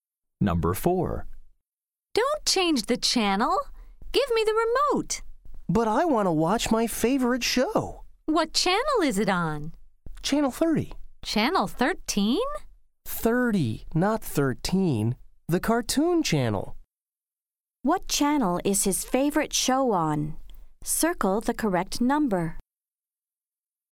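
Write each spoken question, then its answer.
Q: What channel is his favorite show on? Circle the correct number.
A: Channel 30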